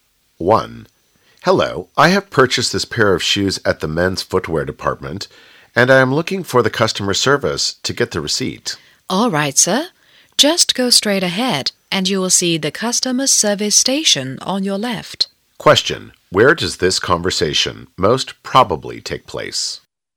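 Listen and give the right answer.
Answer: In a department store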